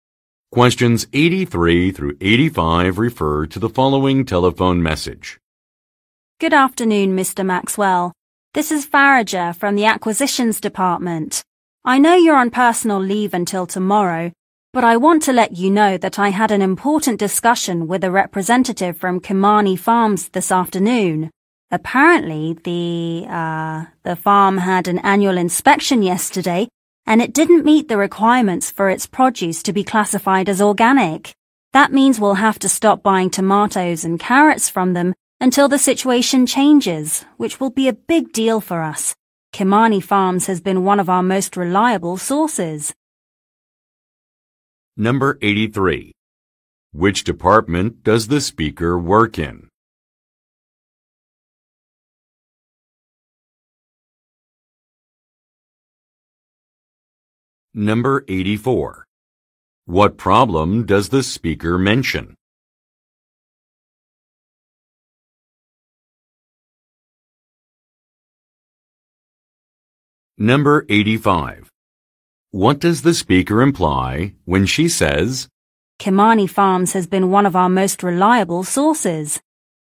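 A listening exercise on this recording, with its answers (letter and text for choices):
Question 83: Which department does the speaker work in?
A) Shipping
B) Accounting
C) Acquisitions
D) Marketing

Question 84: What problem does the speaker mention?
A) A business failed an evaluation.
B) A competitor has opened a new branch.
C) A contract has not been renewed.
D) An order will arrive later than expected.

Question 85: What does the speaker imply when she says, "Kimani Farms has been one of our most reliable sources"?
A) She hopes to meet with a business owner.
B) She wants a company to receive a contract extension.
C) She regrets that a supplier must be replaced.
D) She expects an order to be fulfilled on time.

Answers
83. C) Acquisitions
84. A) A business failed an evaluation.
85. C) She regrets that a supplier must be replaced.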